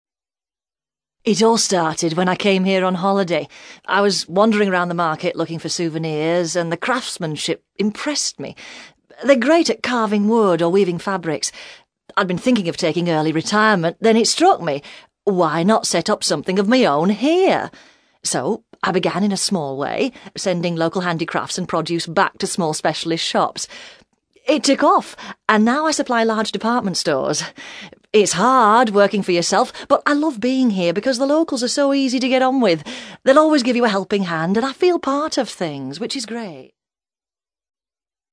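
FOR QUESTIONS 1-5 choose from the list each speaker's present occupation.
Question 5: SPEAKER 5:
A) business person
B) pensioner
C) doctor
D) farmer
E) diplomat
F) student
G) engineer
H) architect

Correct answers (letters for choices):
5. A

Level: CAE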